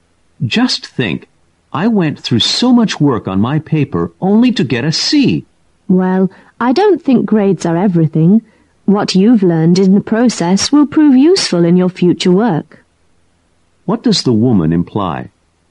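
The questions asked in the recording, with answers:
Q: What does the woman imply?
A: Grades aren't everything; what he learned from the work will be useful later.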